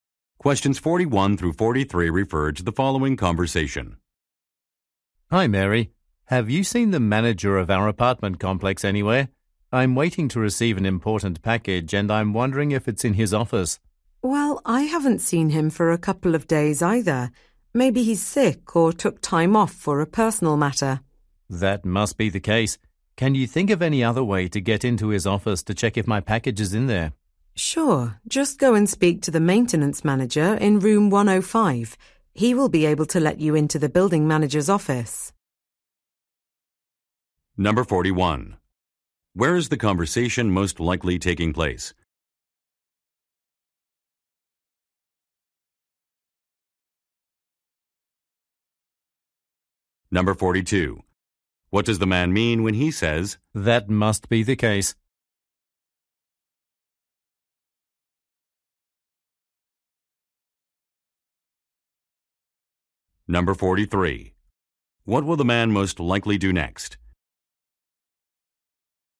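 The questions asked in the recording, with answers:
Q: Where is the conversation most likely taking place?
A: At an apartment complex

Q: What does the man mean when he says,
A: He agrees the manager is probably sick or away

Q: What will the man most likely do next?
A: Speak to the maintenance manager in room 105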